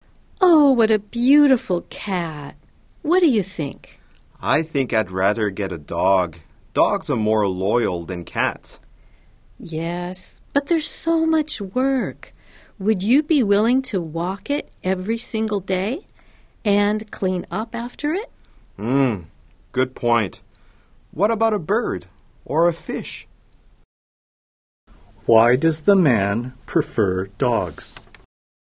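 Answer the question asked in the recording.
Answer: Dogs are more loyal than cats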